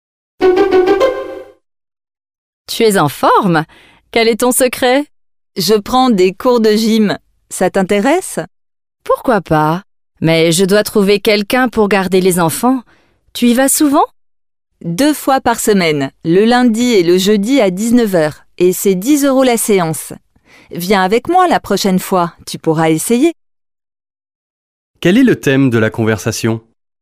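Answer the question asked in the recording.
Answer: Le sport (des cours de gym)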